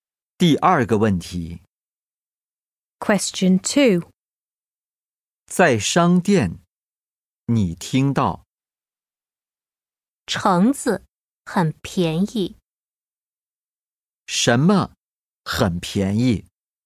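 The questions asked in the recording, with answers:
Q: 什么很便宜?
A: 橙子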